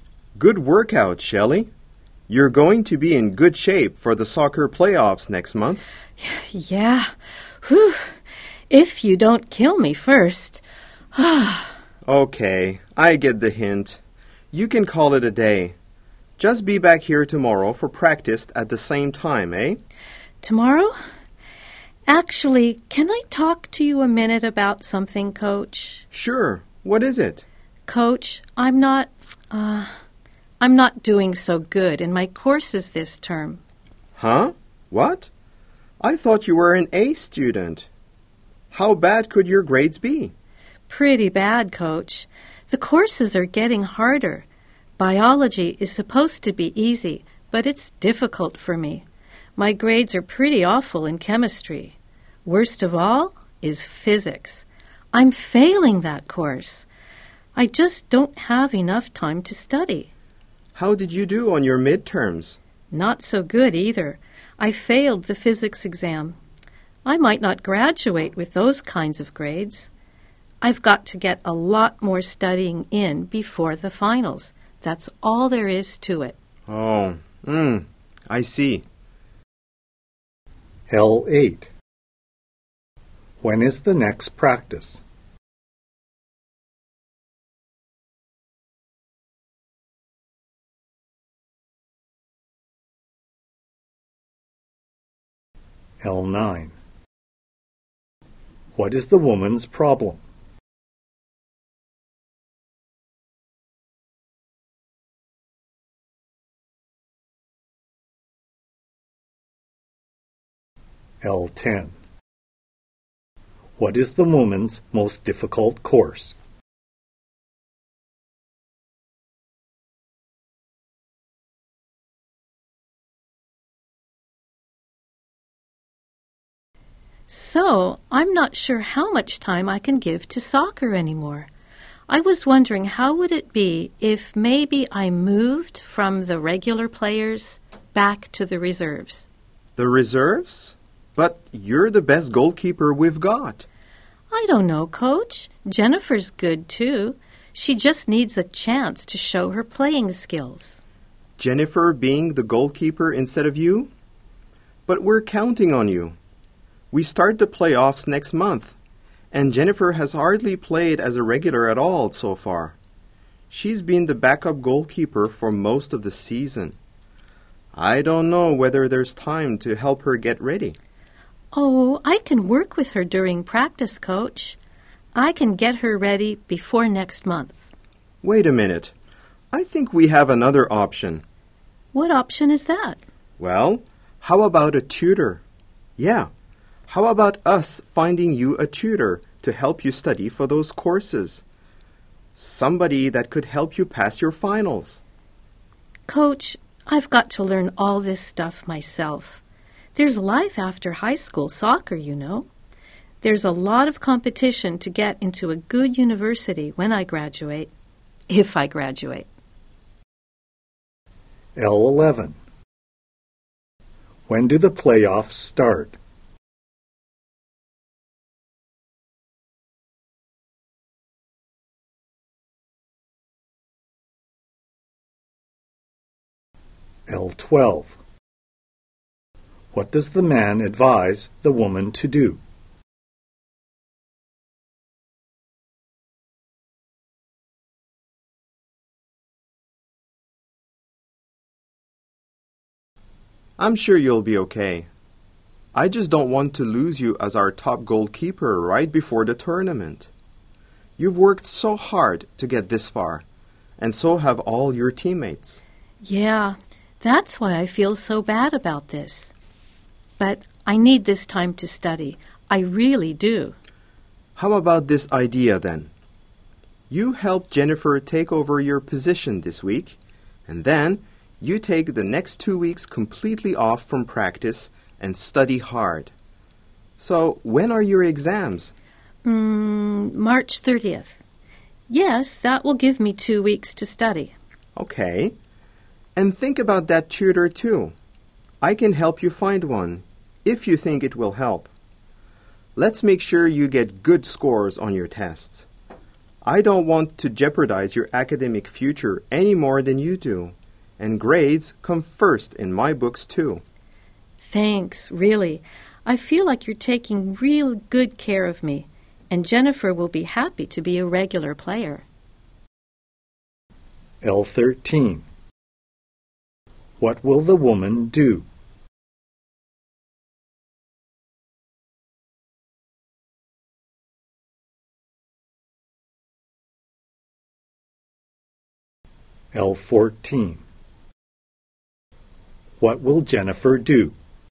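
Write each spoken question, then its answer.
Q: When is the next practice?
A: Tomorrow at the same time

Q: What is the woman's problem?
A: Her grades are bad and she lacks time to study

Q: What is the woman's most difficult course?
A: Physics

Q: When do the playoffs start?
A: Next month

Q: What does the man advise the woman to do?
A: Get a tutor

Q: What will the woman do?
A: Help Jennifer take over this week, then take two weeks off to study

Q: What will Jennifer do?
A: Become the regular goalkeeper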